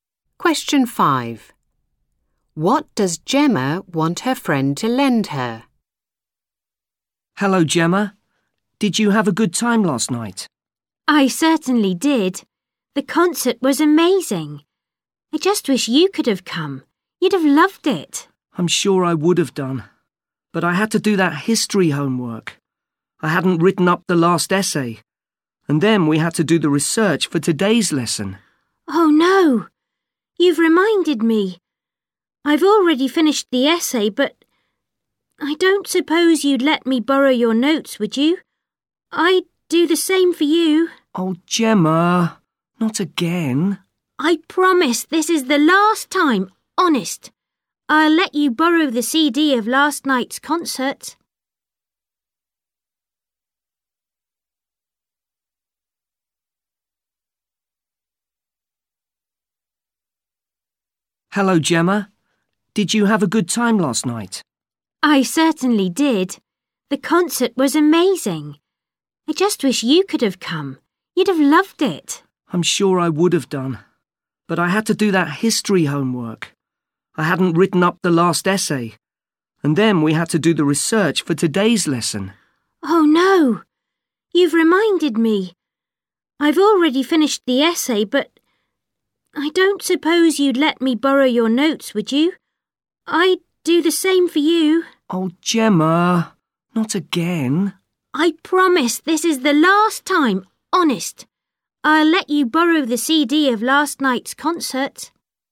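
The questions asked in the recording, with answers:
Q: What does Gemma want her friend to lend her?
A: Her (history) notes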